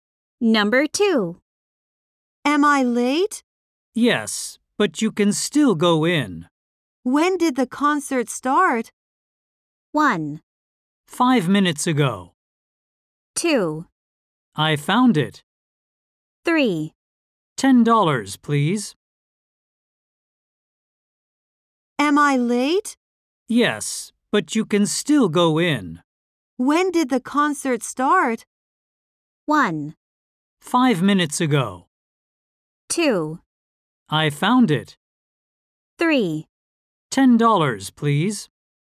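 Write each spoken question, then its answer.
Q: When did the concert start?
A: 1: 5 minutes ago.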